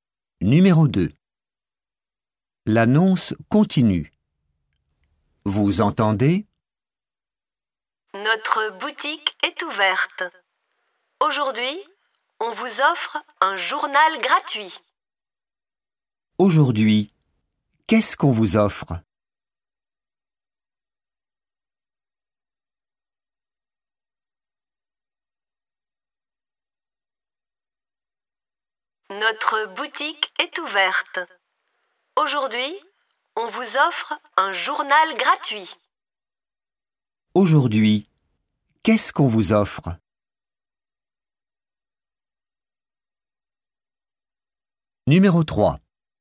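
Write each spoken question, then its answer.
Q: Aujourd'hui, qu'est-ce qu'on vous offre ?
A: un journal gratuit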